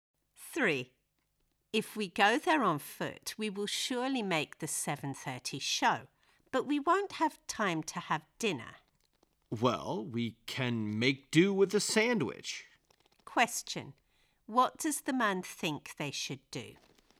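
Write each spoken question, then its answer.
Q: What does the man think they should do?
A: Walk there and just have a sandwich instead of dinner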